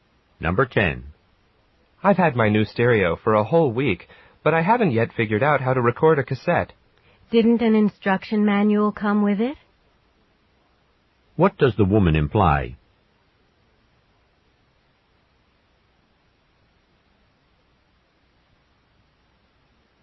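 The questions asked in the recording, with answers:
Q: What does the woman imply?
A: The man should read the instruction manual.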